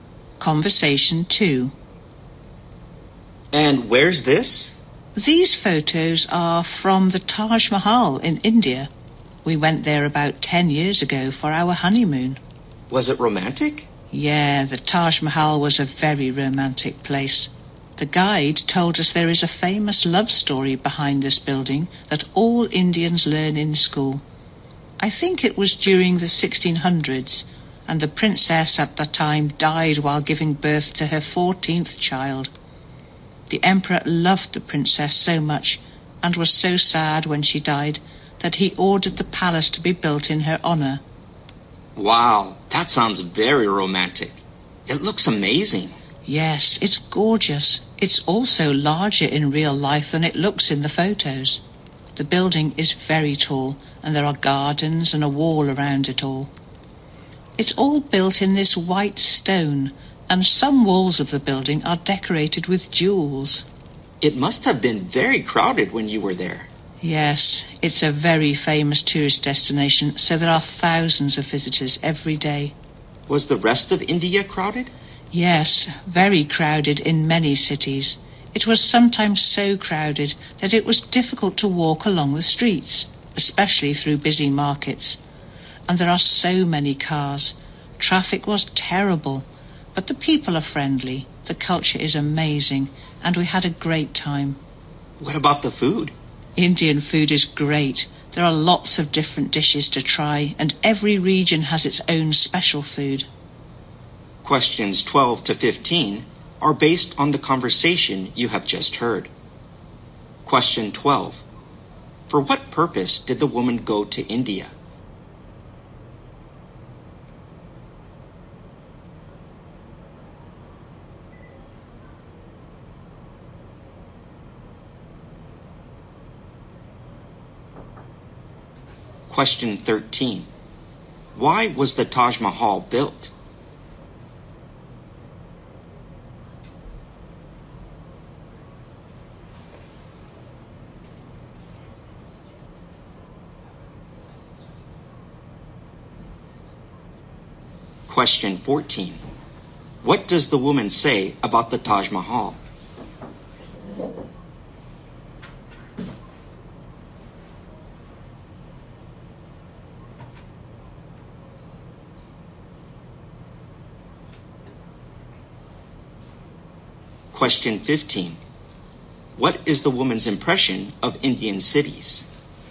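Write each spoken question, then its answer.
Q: For what purpose did the woman go to India?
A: Her honeymoon

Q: Why was the Taj Mahal built?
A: To honor the emperor's beloved princess, who had died

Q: What is the woman's impression of Indian cities?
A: They are very crowded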